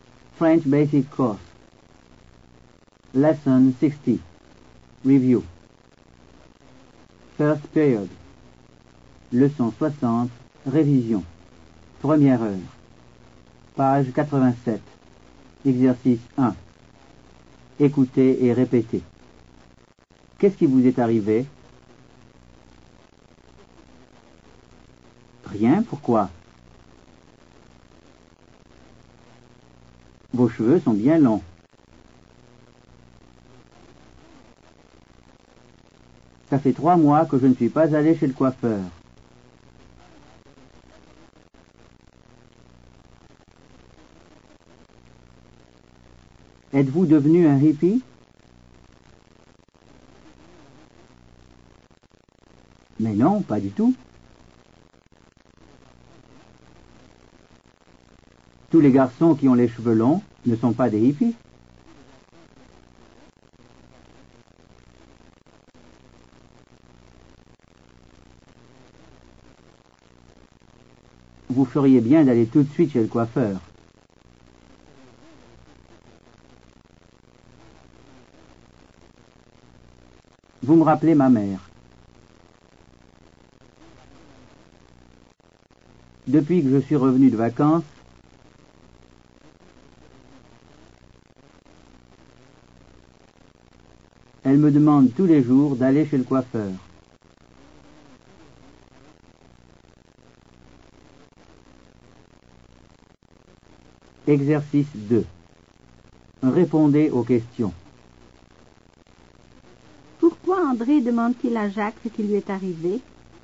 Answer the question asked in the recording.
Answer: Parce que les cheveux de Jacques sont bien longs.